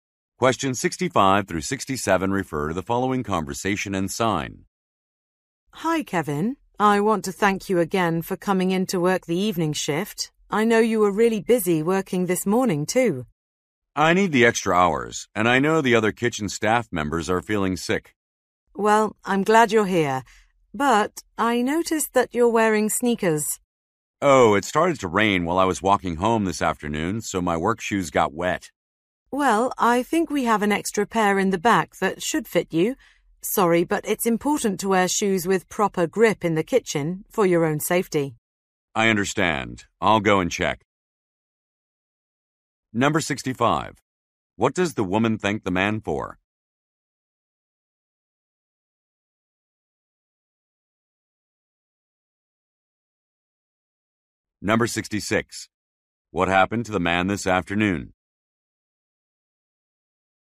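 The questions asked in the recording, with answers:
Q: What does the woman thank the man for?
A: Coming in to work the evening shift

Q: What happened to the man this afternoon?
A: He got caught in the rain and his work shoes got wet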